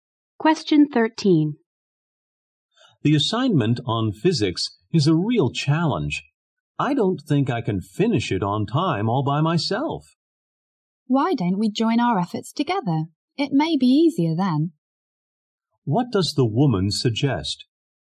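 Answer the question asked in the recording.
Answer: That they work on the physics assignment together.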